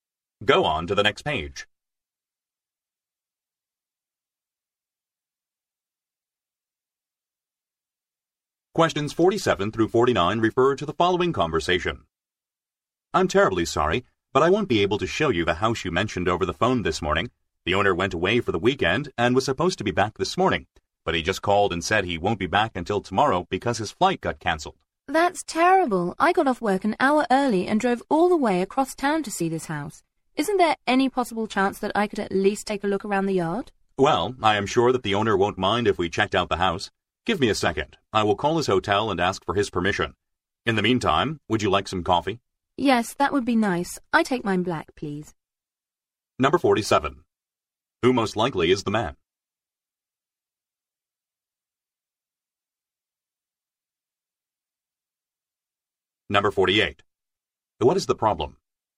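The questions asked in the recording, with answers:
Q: What is the problem?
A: The owner is away, so the house can't be shown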